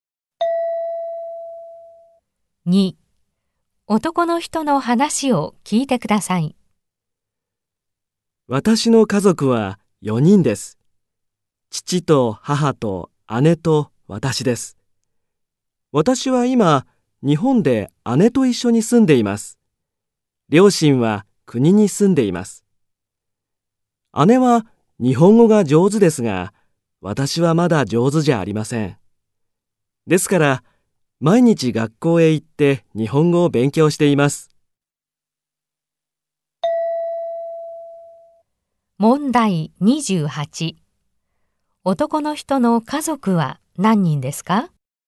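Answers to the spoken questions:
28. 4人
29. 学校へ行って日本語を勉強する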